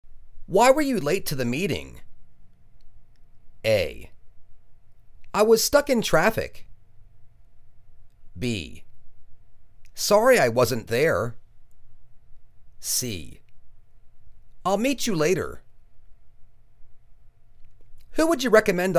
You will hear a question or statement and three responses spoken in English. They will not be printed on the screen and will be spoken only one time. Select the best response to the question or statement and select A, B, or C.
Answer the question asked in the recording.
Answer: I was stuck in traffic.